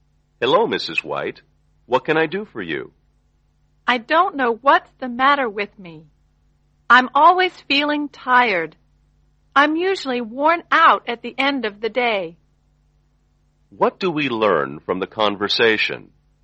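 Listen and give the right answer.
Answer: Mrs. White always feels tired and is probably seeing a doctor.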